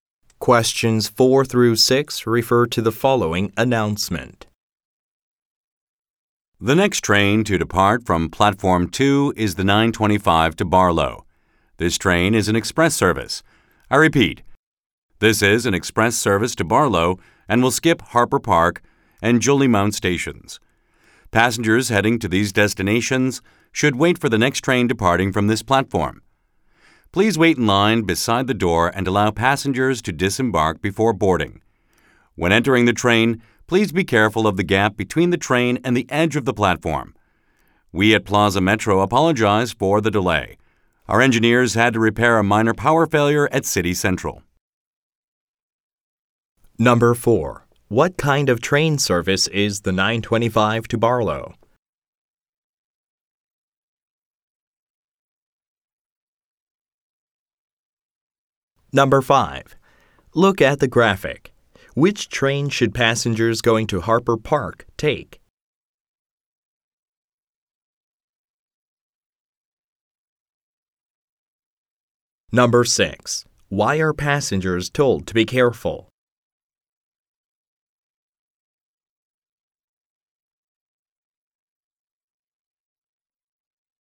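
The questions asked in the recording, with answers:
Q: What kind of train service is the 925 to Barlow?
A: An express service

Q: Why are passengers told to be careful?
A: Because of the gap between the train and the platform edge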